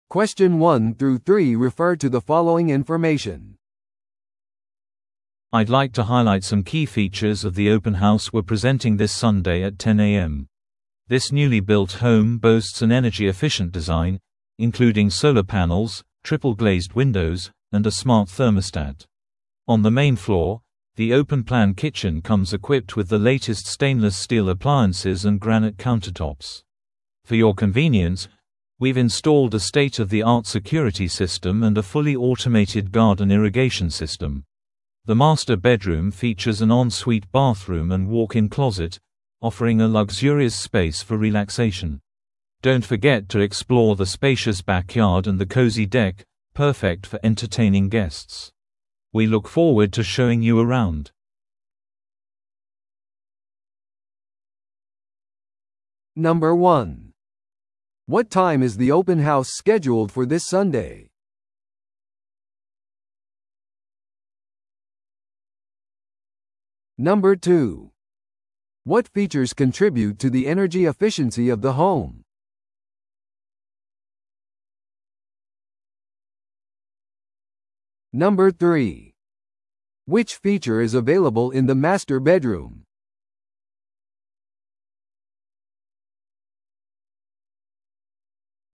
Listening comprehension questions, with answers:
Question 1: What time is the open house scheduled for this Sunday?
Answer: 10amに

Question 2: What features contribute to the energy efficiency of the home?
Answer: 太陽光パネルと三重ガラスの窓

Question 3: Which feature is available in the master bedroom?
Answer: 専用バスルームとウォークインクローゼット

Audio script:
I'd like to highlight some key features of the open house we're presenting this Sunday at 10am. This newly built home boasts an energy-efficient design, including solar panels, triple-glazed windows, and a smart thermostat. On the main floor, the open-plan kitchen comes equipped with the latest stainless-steel appliances and granite countertops. For your convenience, we've installed a state-of-the-art security system and a fully automated garden irrigation system. The master bedroom features an en-suite bathroom and walk-in closet, offering a luxurious space for relaxation. Don't forget to explore the spacious backyard and the cozy deck, perfect for entertaining guests. We look forward to showing you around!